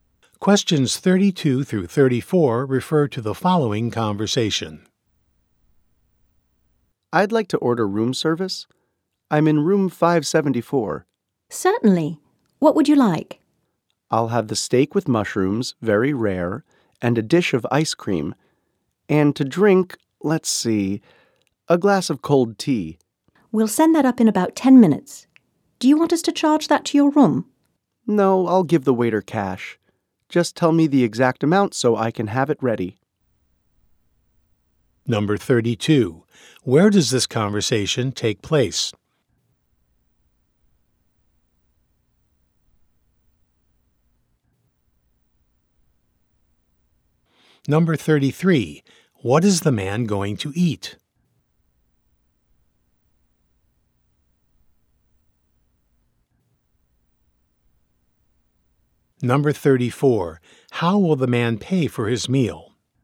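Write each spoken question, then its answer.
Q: Where does this conversation take place?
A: In a hotel

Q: What is the man going to eat?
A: Steak with mushrooms and ice cream

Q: How will the man pay for his meal?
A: In cash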